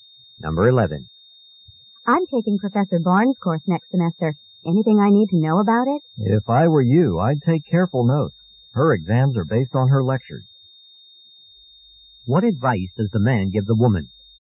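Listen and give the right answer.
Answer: Take careful notes in the lectures.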